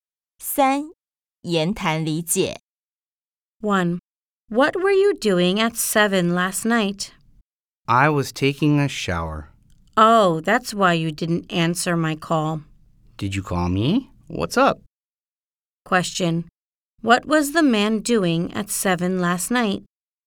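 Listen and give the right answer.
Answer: He was taking a shower.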